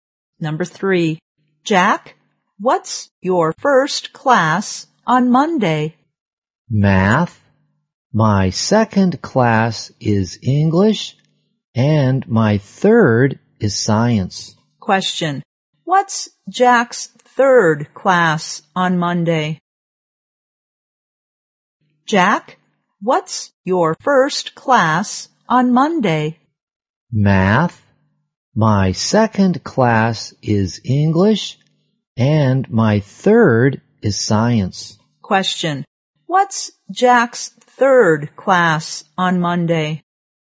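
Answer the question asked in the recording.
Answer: Science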